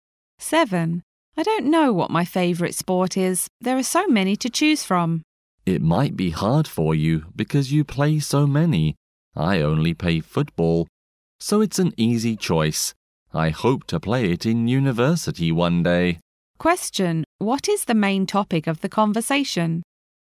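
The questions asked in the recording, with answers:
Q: What is the main topic of the conversation?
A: Favourite sports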